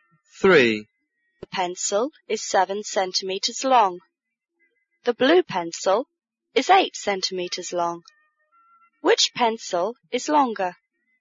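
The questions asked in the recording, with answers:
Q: Which pencil is longer?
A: The blue pencil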